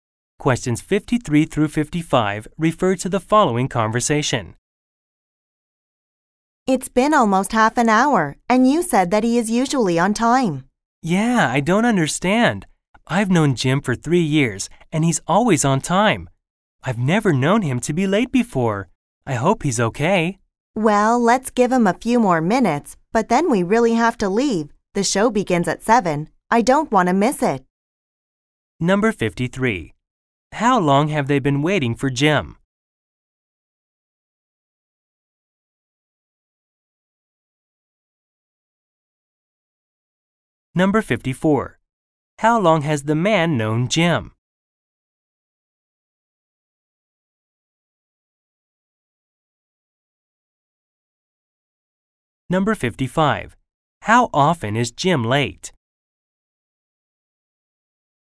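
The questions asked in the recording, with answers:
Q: How long have they been waiting for Jim?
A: Almost half an hour

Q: How long has the man known Jim?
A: 3 years

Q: How often is Jim late?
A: Never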